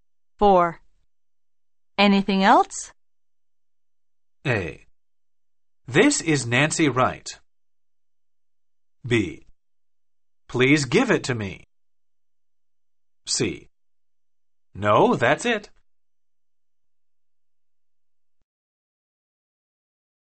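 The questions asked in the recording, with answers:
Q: Anything else?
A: C: No, that's it.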